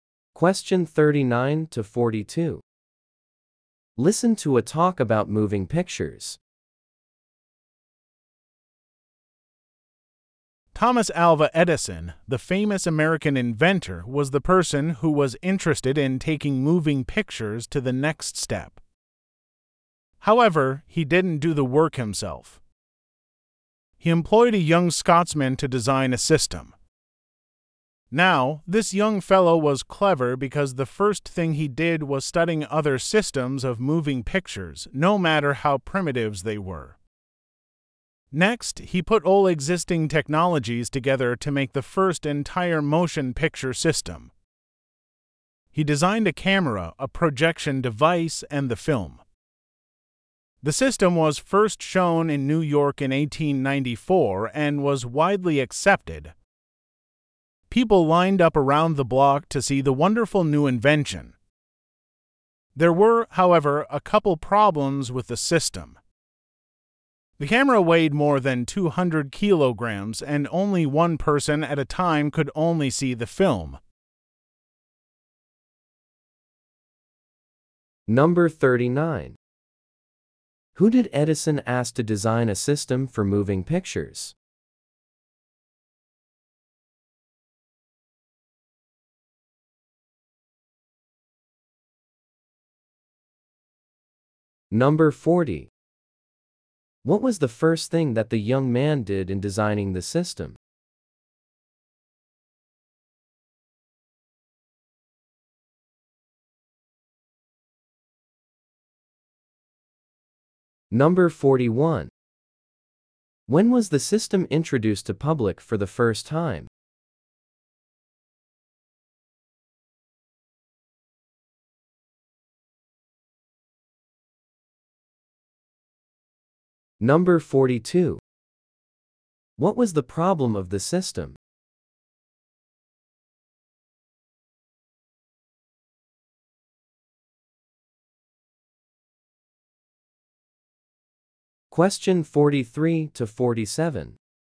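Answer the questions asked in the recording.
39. A young Scotsman
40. Studied other systems of moving pictures
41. In 1894
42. The camera weighed over 200 kg and only one person at a time could see the film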